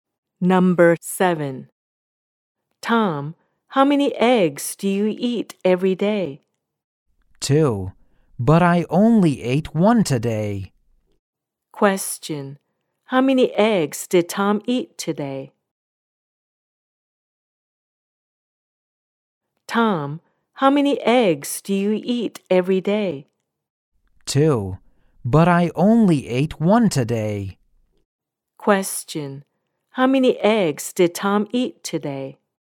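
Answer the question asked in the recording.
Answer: One.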